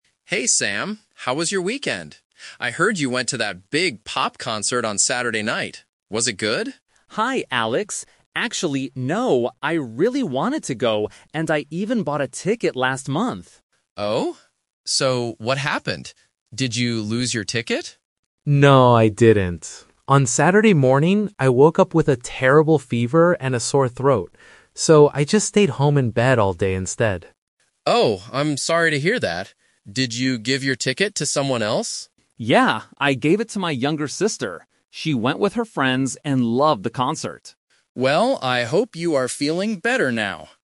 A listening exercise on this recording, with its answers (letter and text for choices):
Listen to the conversation between two colleagues. Then, circle the correct answer for each question.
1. What did Alex think Sam did on Saturday night?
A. He stayed home in bed.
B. He went to a pop concert.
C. He bought a concert ticket.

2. Why didn't Sam go to the concert?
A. Because he lost his ticket.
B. Because he had to work.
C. Because he was sick.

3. Who went to the concert in the end?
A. Sam's sister.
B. Sam.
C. Alex.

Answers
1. B. He went to a pop concert.
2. C. Because he was sick.
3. A. Sam's sister.

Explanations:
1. Alex asks, "I heard you went to that big pop concert on Saturday night." This is what Alex thought (the rumor). Option (A) is the trap; staying home is what Sam actually did, not what Alex thought. Option (C) is a true fact, but it's not the rumor.
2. Sam explains his reason: "I woke up with a terrible fever and a sore throat." This means he was sick. Option (A) is the trap; Alex asks if he lost his ticket, but Sam says "No." Option (B) is never mentioned.
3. Sam says, "Yeah, I gave it to my younger sister. She went with her friends..." Option (B) is the trap; Sam wanted to go but couldn't. Option (C) is the other speaker, who didn't go.

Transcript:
Explanation: Alex asks, "I heard you went to that big pop concert on Saturday night." This is what Alex thought (the rumor).
I really wanted to go, and I even bought a ticket last month.
Alex: Oh? So, what happened? Did you lose your ticket?
Sam: No, I didn't. On Saturday morning, I woke up with a terrible fever and a sore throat. So, I just stayed home in bed all day instead.
Alex: Oh, I'm sorry to hear that. Did you give your ticket to someone else?
Sam: Yeah, I gave it to my younger sister. She went with her friends and loved the concert.
Alex: Well, I hope you are feeling better now.